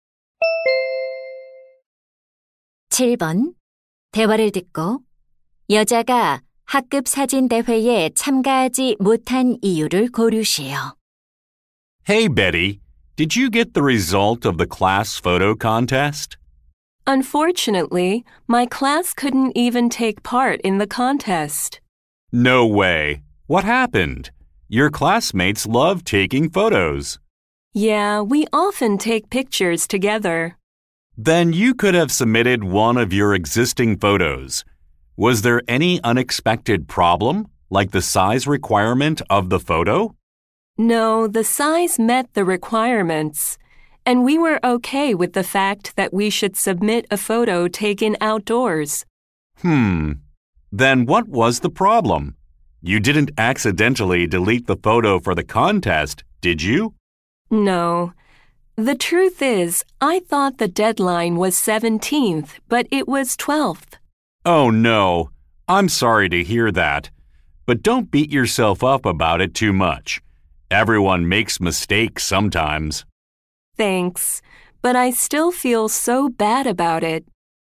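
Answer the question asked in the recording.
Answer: 마감일을 착각해서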